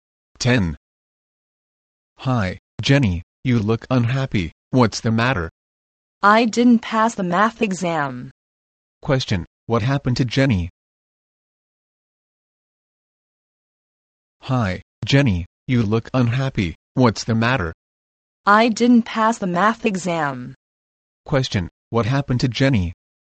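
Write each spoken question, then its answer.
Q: Question, what happened to Jenny?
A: She didn't pass the math exam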